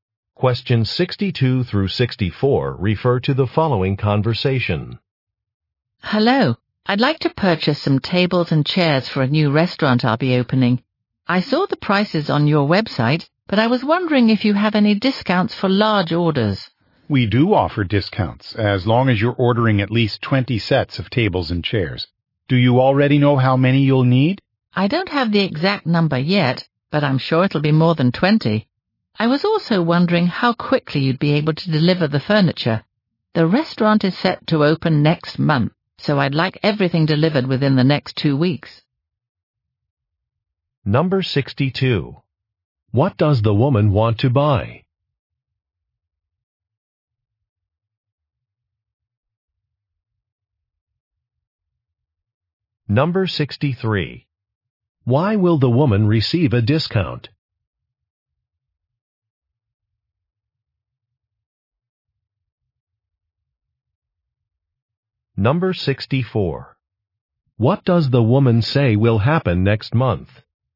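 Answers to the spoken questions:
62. Tables and chairs
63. She will order at least 20 sets
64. Her restaurant will open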